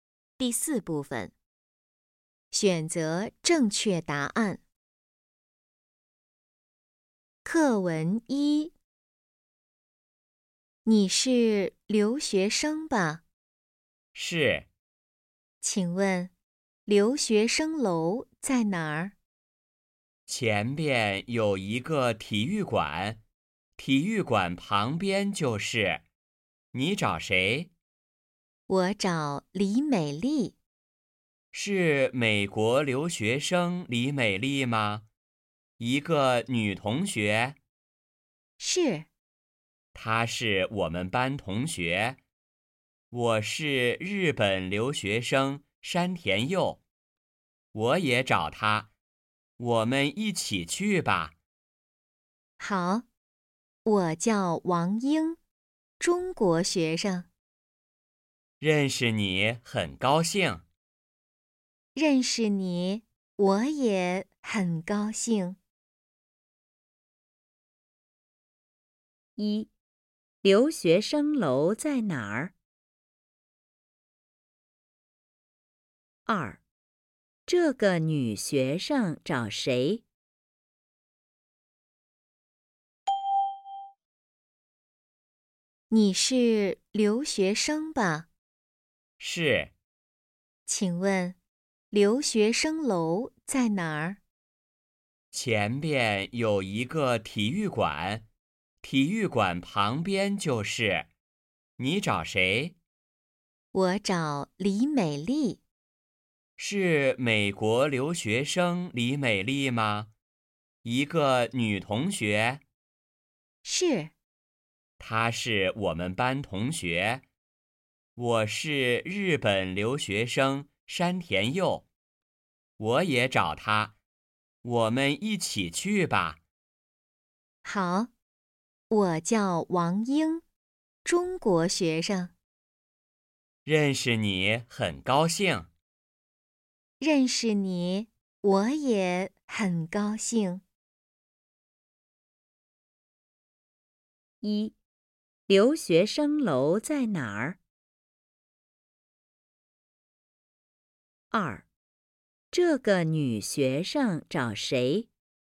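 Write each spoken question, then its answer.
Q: 留学生楼在哪儿?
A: 体育馆旁边

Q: 这个女学生找谁?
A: 李美丽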